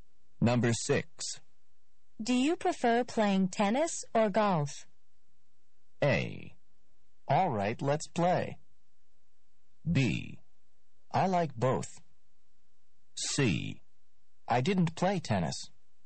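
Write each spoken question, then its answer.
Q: Do you prefer playing tennis or golf?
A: B: I like both.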